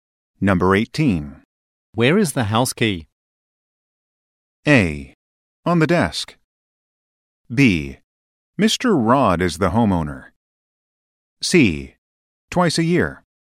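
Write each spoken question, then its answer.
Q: Where is the house key?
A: A: On the desk.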